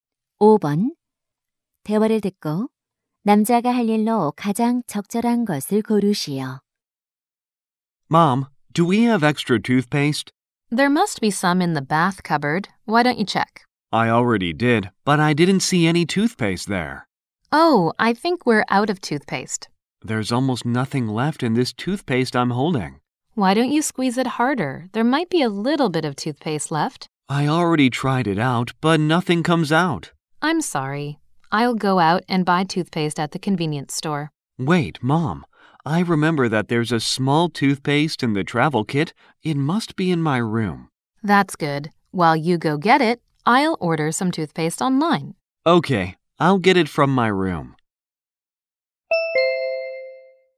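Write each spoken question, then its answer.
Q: 대화를 듣고 남자가 할 일로 가장 적절한 것을 고르시오.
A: 자기 방에서 여행용 키트의 작은 치약 가져오기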